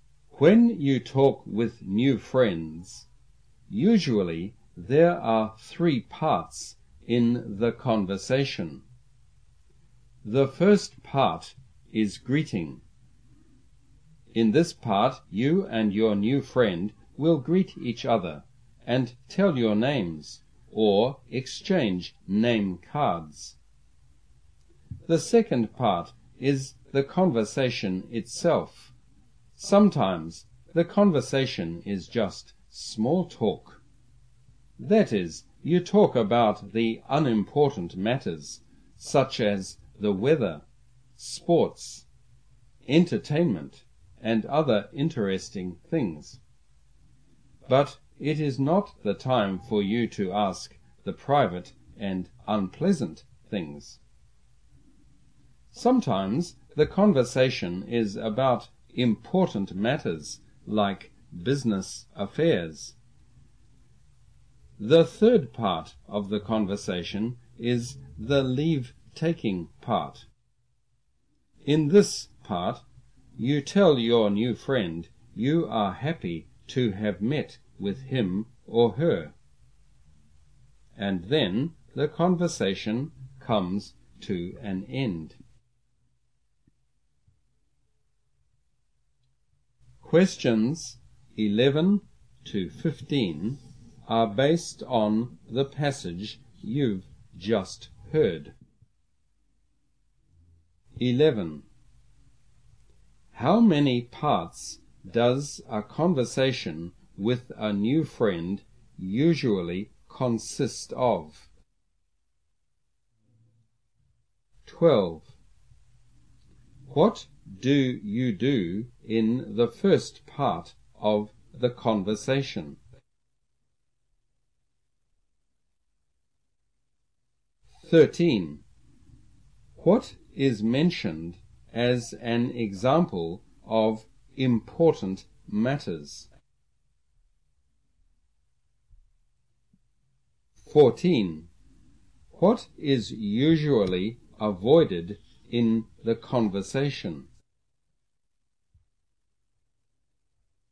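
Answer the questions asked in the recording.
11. Three
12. Greet each other
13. Business affairs
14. Private and unpleasant things
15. Happy to have met him or her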